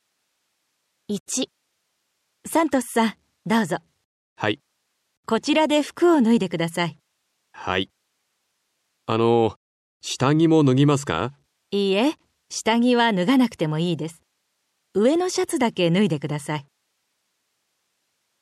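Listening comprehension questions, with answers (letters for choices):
サントスさんは 病院へ 行きました。何を しなければなりませんか。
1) {a. 下着 b. 上の シャツ} を 脱ぎます。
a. 下着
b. 上の シャツ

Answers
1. b

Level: 初級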